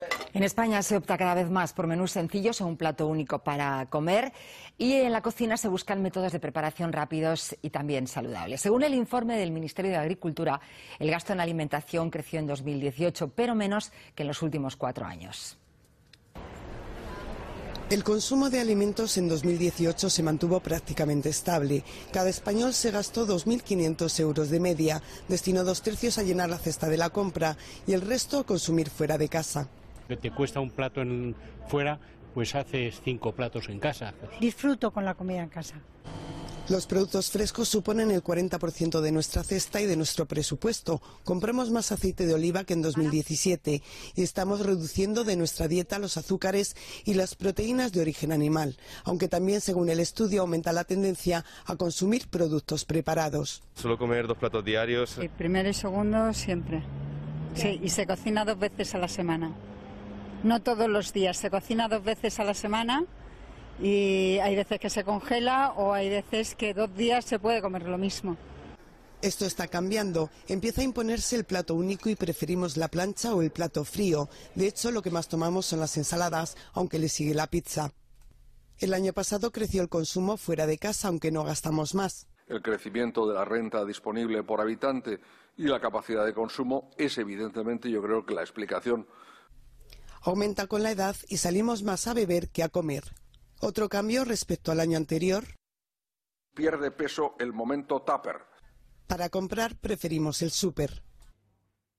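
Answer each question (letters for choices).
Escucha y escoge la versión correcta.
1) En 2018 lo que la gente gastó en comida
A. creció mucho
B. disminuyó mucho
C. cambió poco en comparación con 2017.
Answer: C

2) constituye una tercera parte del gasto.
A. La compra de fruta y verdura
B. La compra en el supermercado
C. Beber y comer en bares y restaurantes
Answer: C

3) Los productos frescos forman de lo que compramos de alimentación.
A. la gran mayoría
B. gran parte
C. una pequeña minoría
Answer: B

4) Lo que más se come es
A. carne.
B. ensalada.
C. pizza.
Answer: B

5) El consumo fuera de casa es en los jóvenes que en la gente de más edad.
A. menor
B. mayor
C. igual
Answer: A

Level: B2级别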